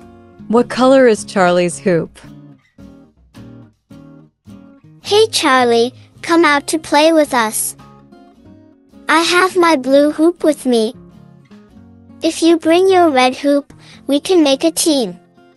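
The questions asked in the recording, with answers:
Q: What color is Charlie's hoop?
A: Red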